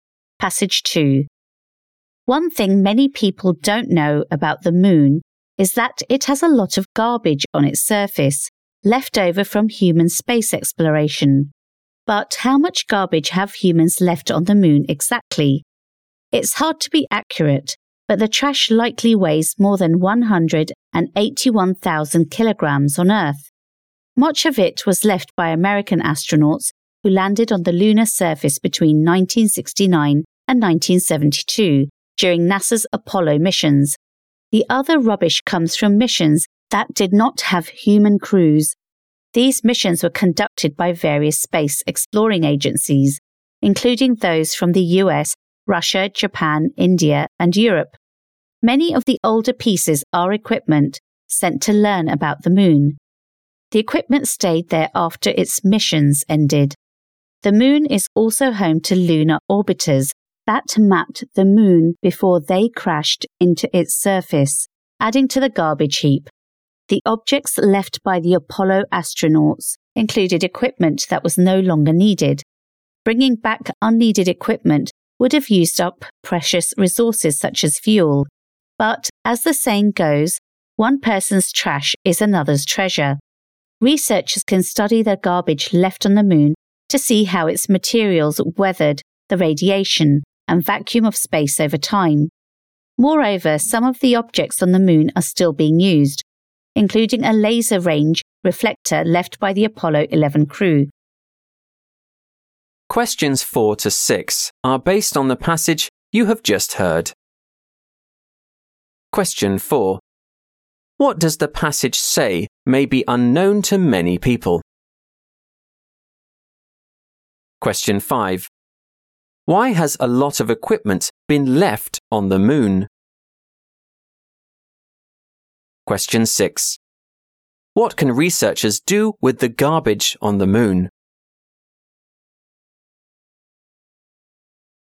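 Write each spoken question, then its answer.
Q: What does the passage say may be unknown to many people?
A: The moon has a lot of garbage on its surface left from human space exploration

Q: Why has a lot of equipment been left on the moon?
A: Bringing back unneeded equipment would have used up precious resources such as fuel

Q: What can researchers do with the garbage on the moon?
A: Study how its materials weathered the radiation and vacuum of space over time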